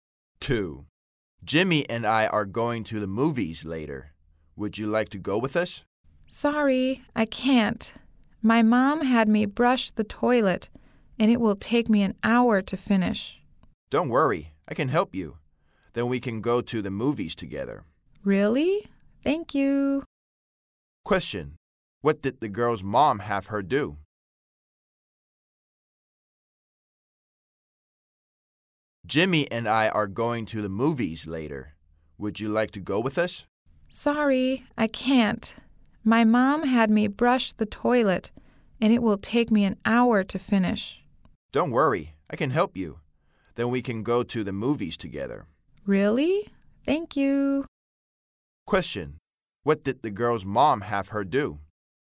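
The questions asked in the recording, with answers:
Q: What did the girl's mom have her do?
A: Brush the toilet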